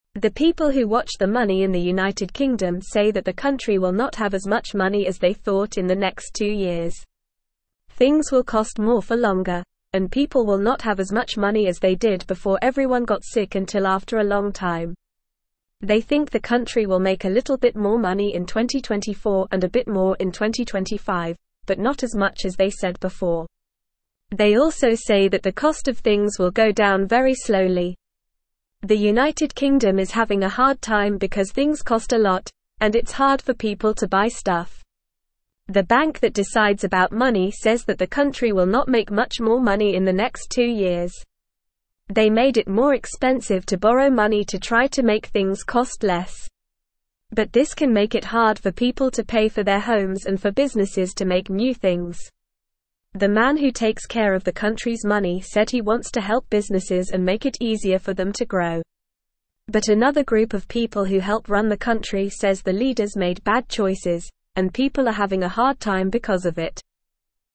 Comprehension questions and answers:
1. The people who watch the money in the United Kingdom say that the country will not have as much money as they thought in the (1)______ two years.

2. Things will cost (2)______ for longer, and people will not have as much money as they did before everyone got sick until after a long time.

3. They also say that the cost of (3)______ will go down very slowly.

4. The United Kingdom is having a hard (4)______ because things cost a lot, and it's hard for people to buy stuff.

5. They made it more (5)______ to borrow money to try to make things cost less.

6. But this can make it hard for (6)______ to pay for their homes and for businesses to make new things.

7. The man who takes care of the (7)______'s money said he wants to help businesses and make it easier for them to grow.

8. But another (8)______ of people who help run the country says the leaders made bad choices, and people are having a hard time because of it.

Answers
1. next
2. more
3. things
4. time
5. expensive
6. people
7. country
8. group

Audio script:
The people who watch the money in the United Kingdom say that the country will not have as much money as they thought in the next two years. Things will cost more for longer, and people will not have as much money as they did before everyone got sick until after a long time. They think the country will make a little bit more money in 2024 and a bit more in 2025, but not as much as they said before. They also say that the cost of things will go down very slowly.
The United Kingdom is having a hard time because things cost a lot, and it's hard for people to buy stuff. The bank that decides about money says that the country will not make much more money in the next two years. They made it more expensive to borrow money to try to make things cost less. But this can make it hard for people to pay for their homes and for businesses to make new things. The man who takes care of the country's money said he wants to help businesses and make it easier for them to grow. But another group of people who help run the country says the leaders made bad choices, and people are having a hard time because of it.

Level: Level 1